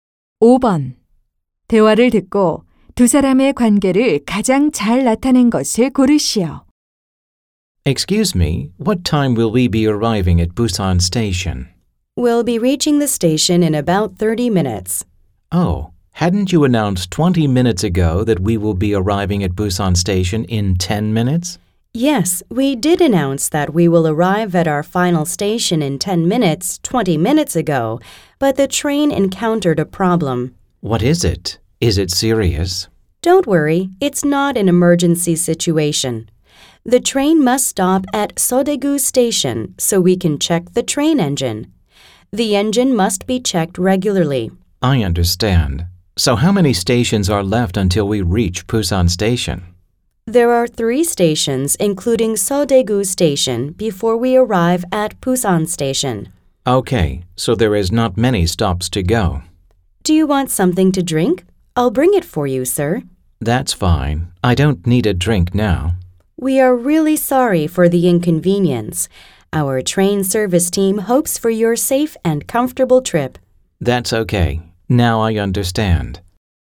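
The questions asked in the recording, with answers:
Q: 대화를 듣고 두 사람의 관계를 가장 잘 나타낸 것을 고르시오.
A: 기차 승객 - 승무원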